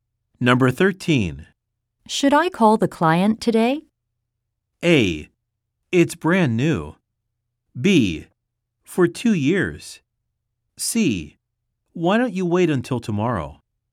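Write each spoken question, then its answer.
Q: Should I call the client today?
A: C: Why don't you wait until tomorrow?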